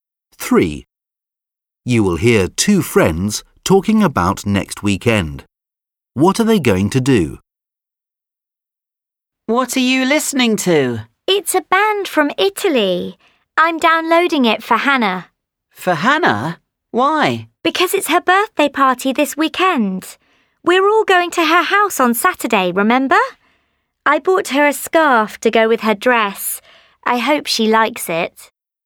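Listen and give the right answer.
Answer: Go to Hannah's birthday party at her house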